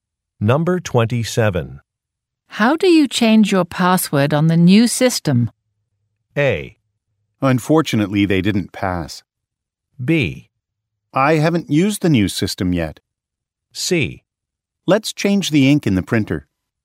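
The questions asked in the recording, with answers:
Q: How do you change your password on the new system?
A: B: I haven't used the new system yet.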